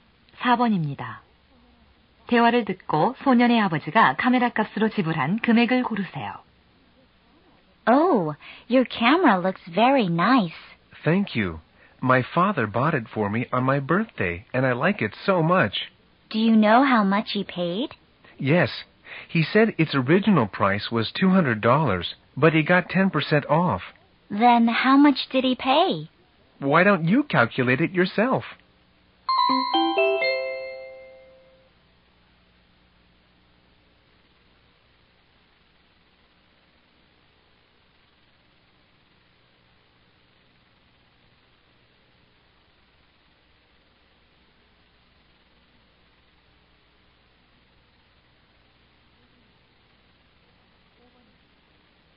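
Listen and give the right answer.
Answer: 180달러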